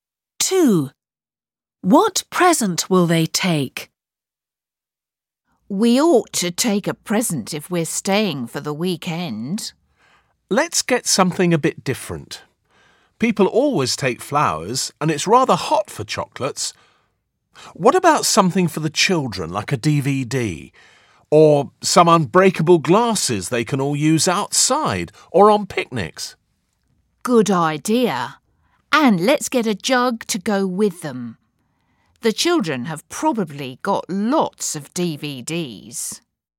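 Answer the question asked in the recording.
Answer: unbreakable glasses and a jug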